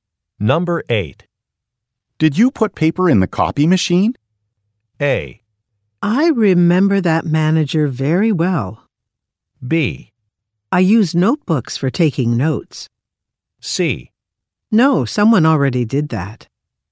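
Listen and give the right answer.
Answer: C: No, someone already did that.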